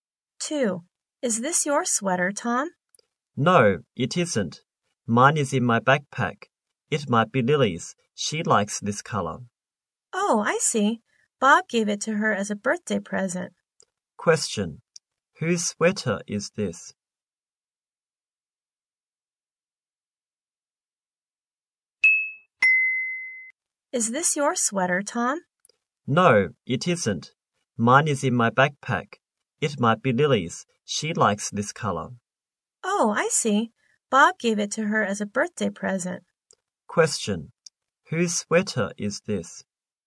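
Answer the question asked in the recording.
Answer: Lily's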